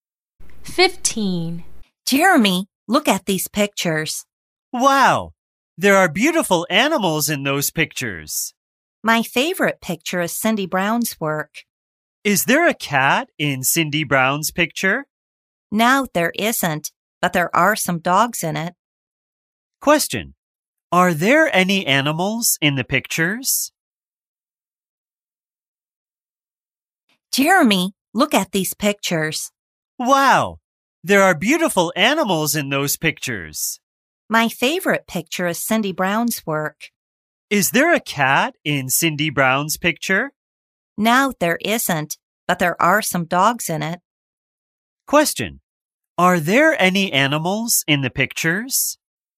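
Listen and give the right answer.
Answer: Yes, there are (some dogs)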